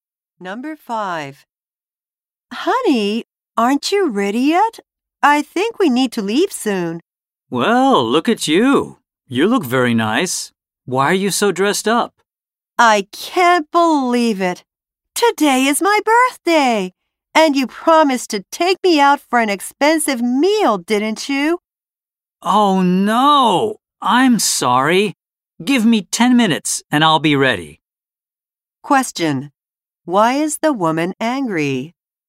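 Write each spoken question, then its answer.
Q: Why is the woman angry?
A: The man forgot his promise to take her out for her birthday dinner.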